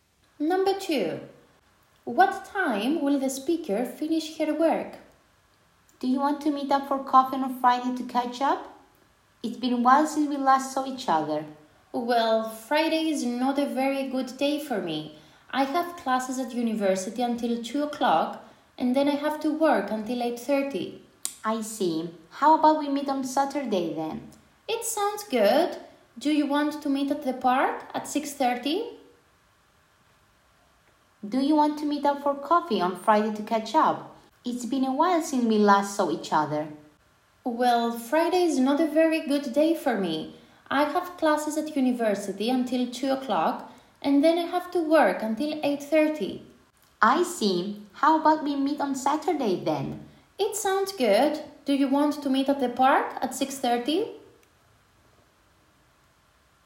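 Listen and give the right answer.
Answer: 8:30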